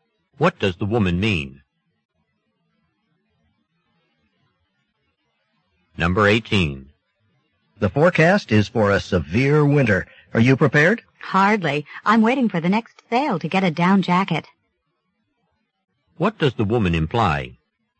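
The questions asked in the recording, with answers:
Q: What does the woman imply?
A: She isn't ready for winter yet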